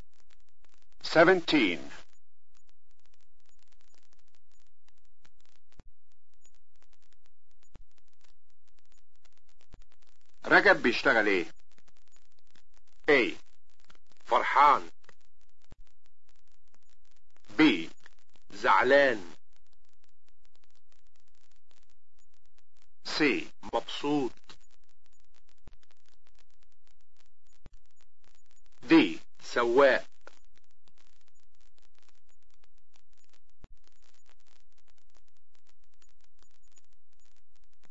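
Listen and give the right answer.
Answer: D: سواق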